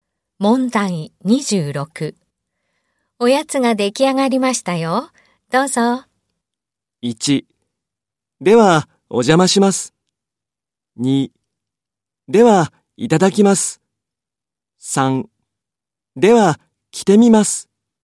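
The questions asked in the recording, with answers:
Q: おやつが出来上がりましたよ。どうぞ。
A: 2: では、いただきます。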